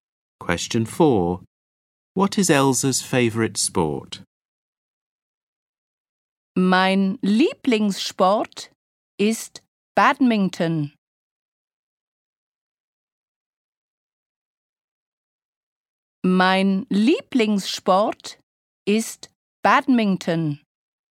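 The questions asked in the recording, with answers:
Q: What is Elsa's favorite sport?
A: Badminton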